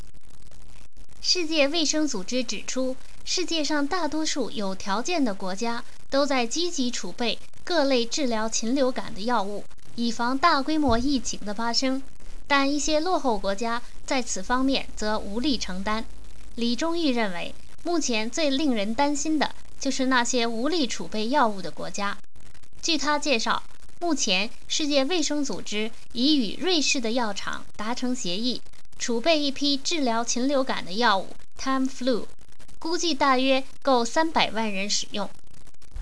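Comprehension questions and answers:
Please answer the following questions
世界卫生组织与瑞士的药厂达成了什么协议?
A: 储备一批治疗禽流感的药物Tamiflu,大约够300万人使用

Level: 3rd Year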